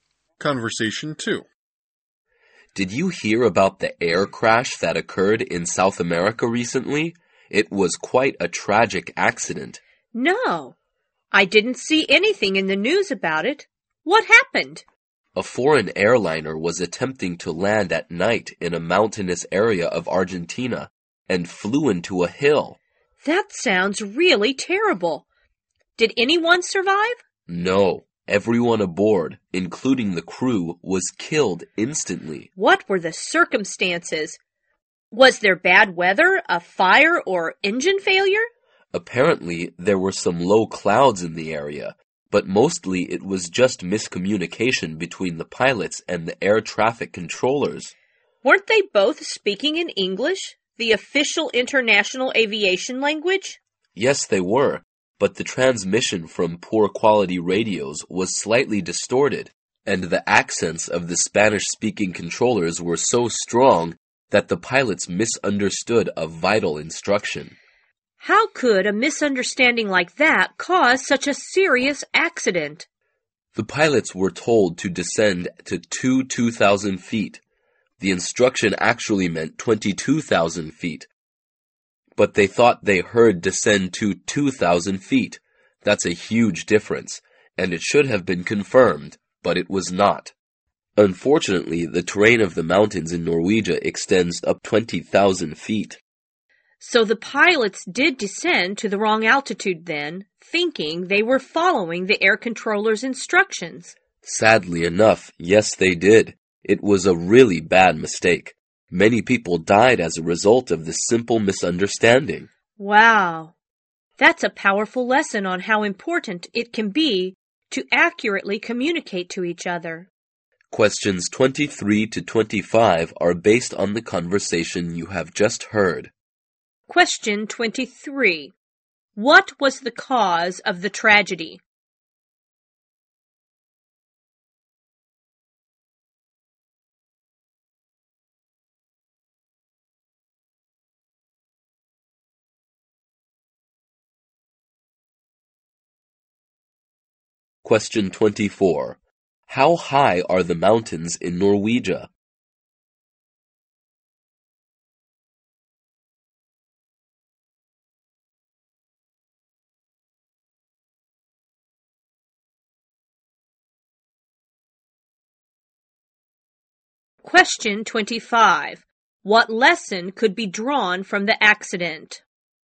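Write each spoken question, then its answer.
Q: What was the cause of the tragedy?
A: Miscommunication between the pilots and the air traffic controllers

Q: How high are the mountains in Norwegia?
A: Up to 20,000 feet

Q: What lesson could be drawn from the accident?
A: Accurate communication is very important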